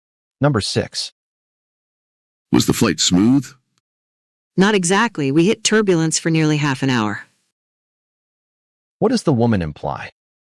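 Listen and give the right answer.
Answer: The flight was bumpy.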